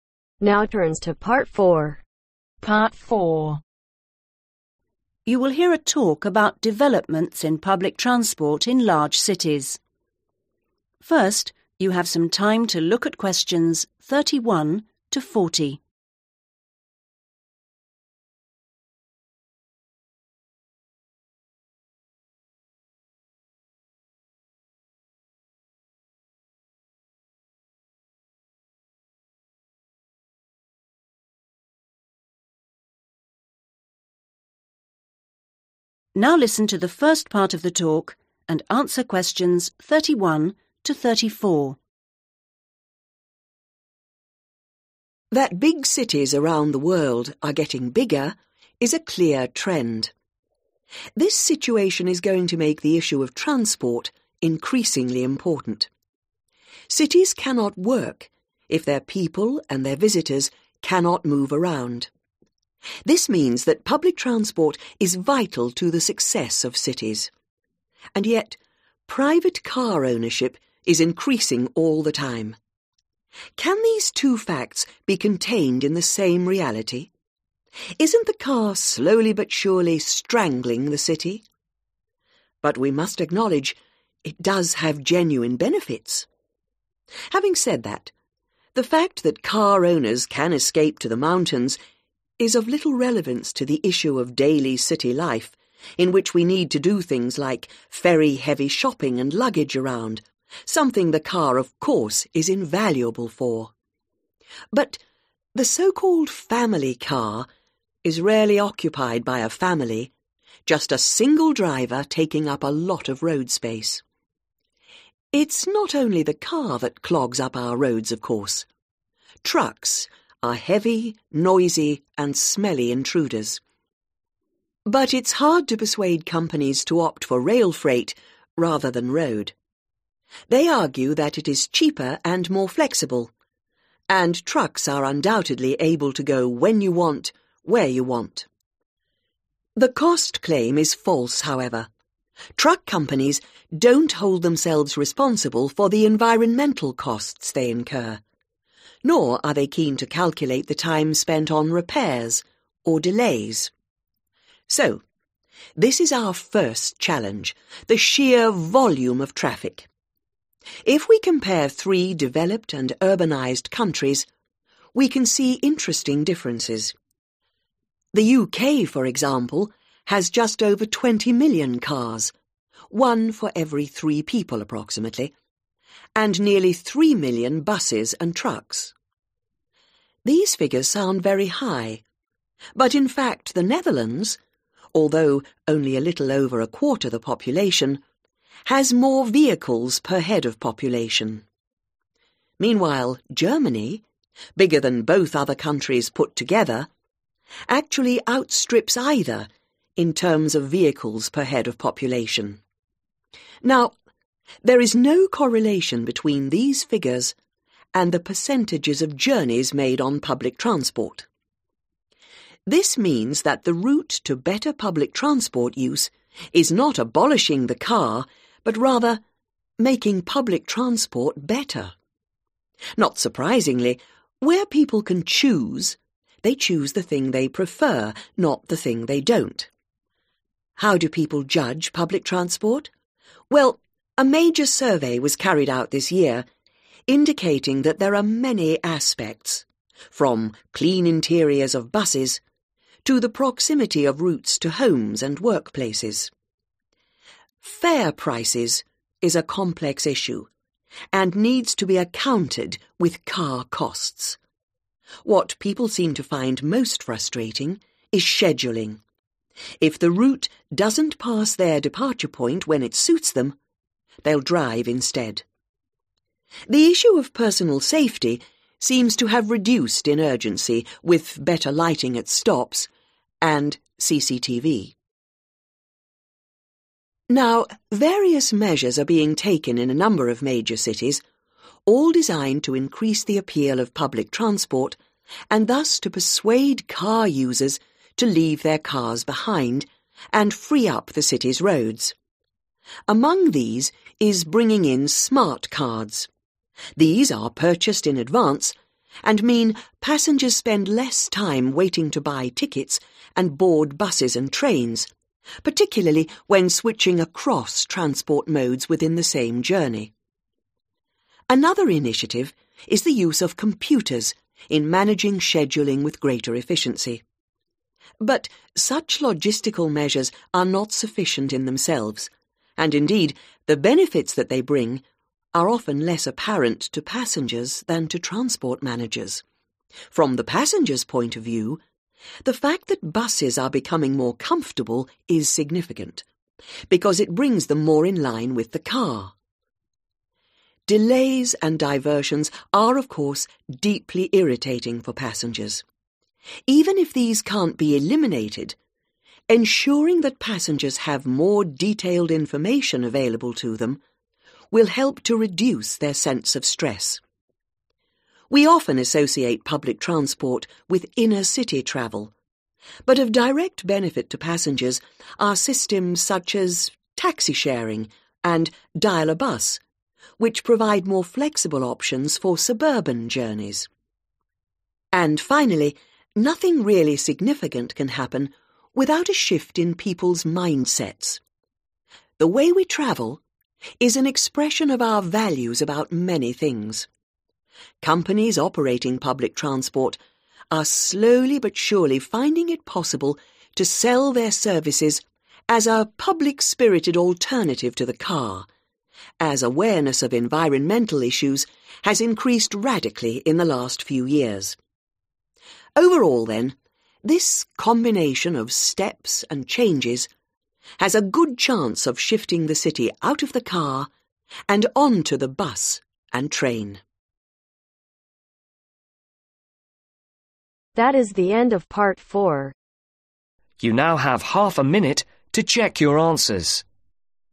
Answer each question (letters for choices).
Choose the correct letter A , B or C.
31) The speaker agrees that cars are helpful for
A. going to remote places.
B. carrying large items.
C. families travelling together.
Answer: B

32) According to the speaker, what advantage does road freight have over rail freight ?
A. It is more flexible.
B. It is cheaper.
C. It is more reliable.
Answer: A

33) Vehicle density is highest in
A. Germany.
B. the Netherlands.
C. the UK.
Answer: A

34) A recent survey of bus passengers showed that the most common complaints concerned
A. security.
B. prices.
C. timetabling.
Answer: C

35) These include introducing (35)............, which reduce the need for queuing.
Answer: Smart cards

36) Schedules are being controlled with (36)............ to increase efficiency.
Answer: Computers

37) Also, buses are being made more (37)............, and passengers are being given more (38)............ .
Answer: Comfortable

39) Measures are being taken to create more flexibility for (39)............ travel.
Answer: Suburban

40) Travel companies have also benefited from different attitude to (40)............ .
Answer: Environmental issues